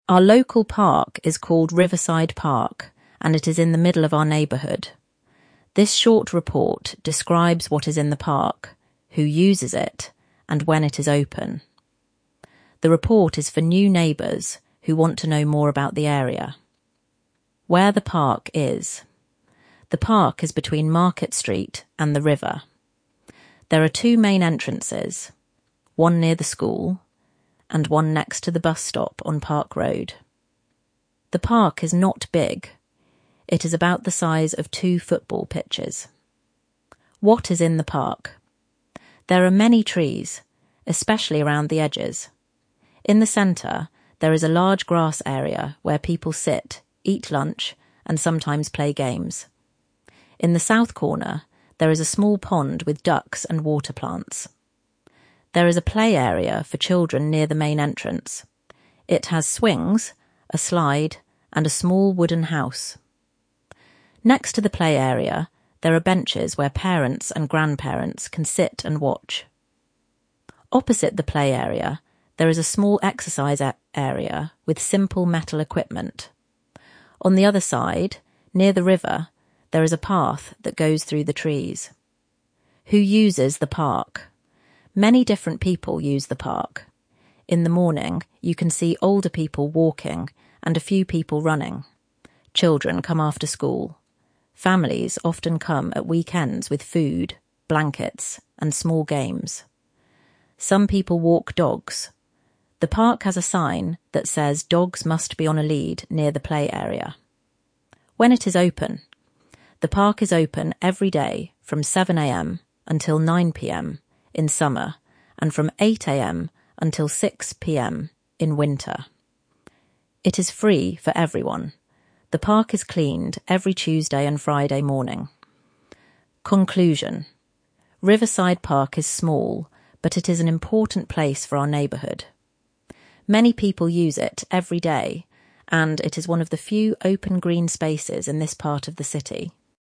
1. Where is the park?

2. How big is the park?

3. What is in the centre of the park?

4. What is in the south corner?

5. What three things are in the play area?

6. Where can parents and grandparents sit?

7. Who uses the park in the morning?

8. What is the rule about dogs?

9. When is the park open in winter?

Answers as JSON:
{"1": "Between Market Street and the river. There are two entrances — one near the school, one next to the bus stop on Park Road.", "2": "About the size of two football pitches — not big.", "3": "A large grass area where people sit, eat lunch, and sometimes play games.", "4": "A small pond with ducks and water plants.", "5": "Swings, a slide, and a small wooden house.", "6": "On benches next to the play area.", "7": "Older people walking, and a few people running.", "8": "Dogs must be on a lead near the play area.", "9": "From 8 a.m. until 6 p.m."}

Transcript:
Our local park is called Riverside Park, and it is in the middle of our neighbourhood. This short report describes what is in the park, who uses it, and when it is open. The report is for new neighbours who want to know more about the area.
WHERE THE PARK IS
The park is between Market Street and the river. There are two main entrances: one near the school and one next to the bus stop on Park Road. The park is not big — it is about the size of two football pitches.
There are many trees, especially around the edges. In the centre, there is a large grass area where people sit, eat lunch, and sometimes play games. In the south corner, there is a small pond with ducks and water plants.
There is a play area for children near the main entrance. It has swings, a slide, and a small wooden house. Next to the play area, there are benches where parents and grandparents can sit and watch.
Opposite the play area, there is a small exercise area with simple metal equipment. On the other side, near the river, there is a path that goes through the trees.
WHO USES THE PARK
Many different people use the park. In the morning, you can see older people walking and a few people running. Children come after school. Families often come at weekends with food, blankets, and small games.
Some people walk dogs. The park has a sign that says dogs must be on a lead near the play area.
The park is open every day from 7 a.m. until 9 p.m. in summer, and from 8 a.m. until 6 p.m. in winter. It is free for everyone. The park is cleaned every Tuesday and Friday morning.
CONCLUSION
Riverside Park is small, but it is an important place for our neighbourhood. Many people use it every day, and it is one of the few open green spaces in this part of the city.